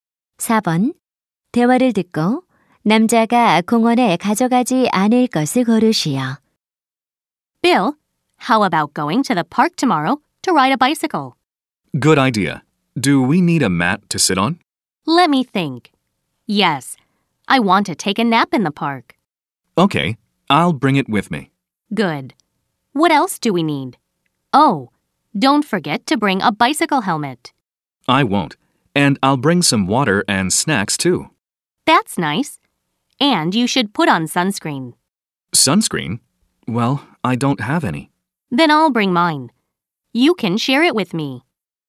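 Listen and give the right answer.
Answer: 선크림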